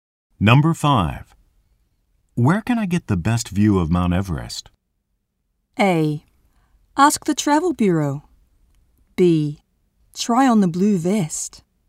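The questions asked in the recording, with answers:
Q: Where can I get the best view of Mount Everest?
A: A: Ask the travel bureau.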